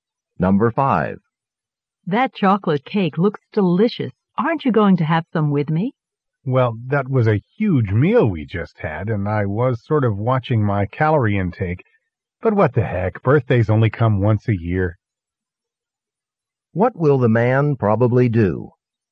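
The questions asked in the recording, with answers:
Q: What will the man probably do?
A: Eat some of the cake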